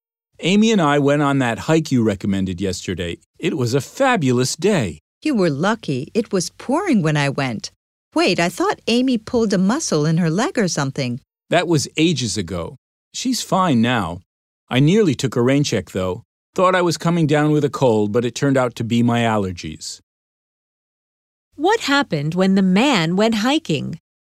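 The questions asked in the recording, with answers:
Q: What happened when the man went hiking?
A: It was pouring rain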